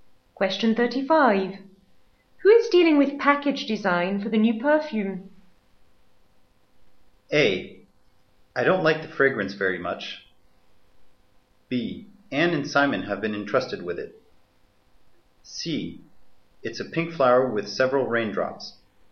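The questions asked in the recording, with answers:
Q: Who is dealing with package design for the new perfume?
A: B: Anne and Simon have been entrusted with it.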